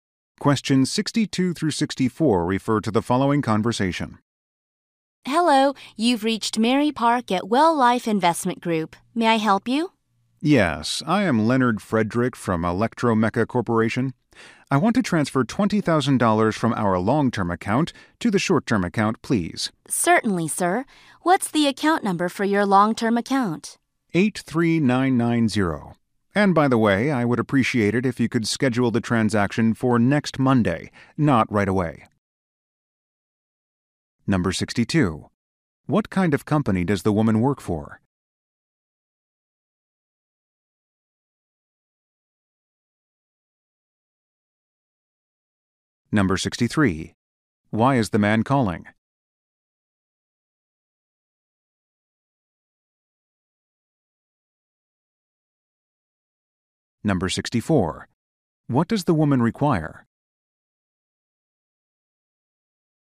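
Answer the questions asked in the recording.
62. An investment company
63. To transfer money between accounts
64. The account number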